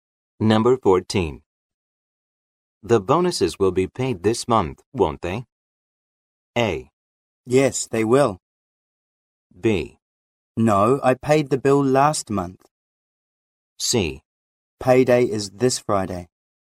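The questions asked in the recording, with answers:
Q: The bonuses will be paid this month, won't they?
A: A: Yes, they will.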